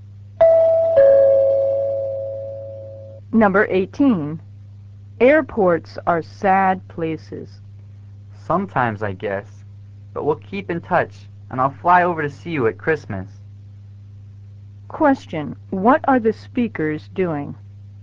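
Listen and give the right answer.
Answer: Saying goodbye at the airport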